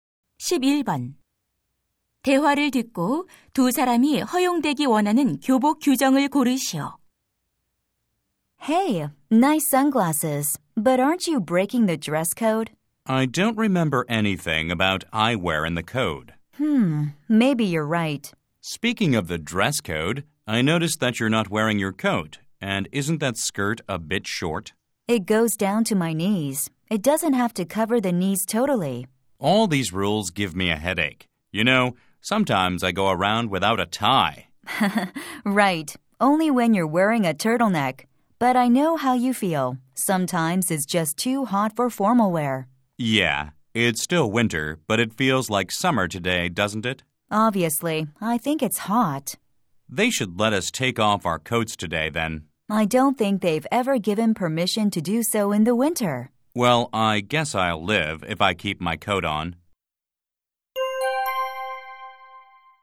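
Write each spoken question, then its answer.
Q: 대화를 듣고 두 사람이 허용되기 원하는 교복 규정을 고르시오.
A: 더운 날 코트를 벗는 것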